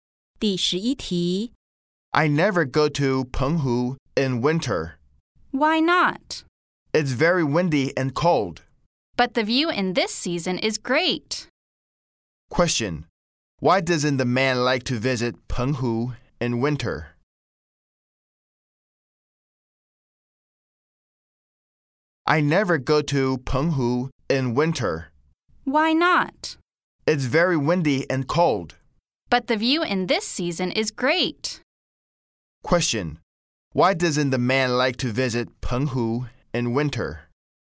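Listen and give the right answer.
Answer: Because it's very windy and cold.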